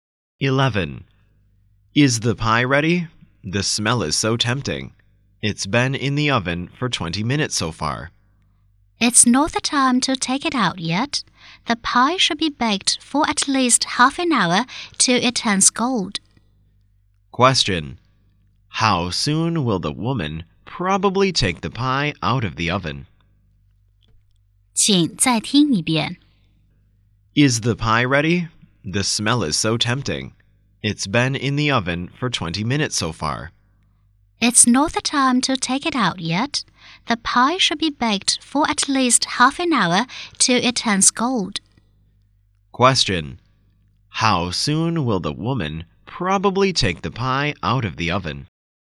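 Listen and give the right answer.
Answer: In about 10 minutes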